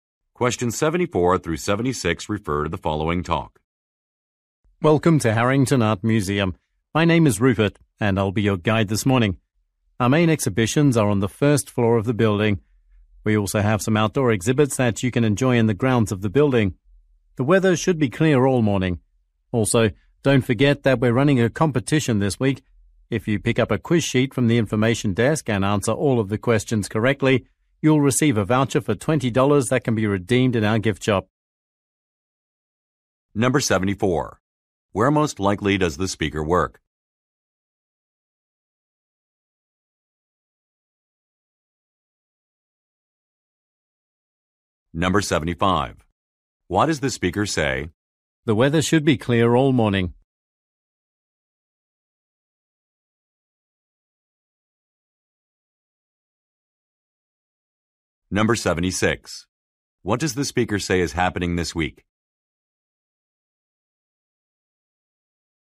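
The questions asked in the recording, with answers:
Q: Where most likely does the speaker work?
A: At an art museum

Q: What does the speaker say is happening this week?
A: A quiz competition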